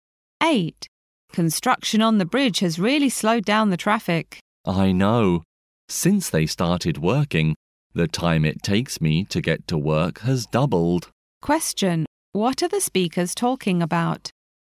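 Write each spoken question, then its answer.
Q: What are the speakers talking about?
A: Traffic delays caused by bridge construction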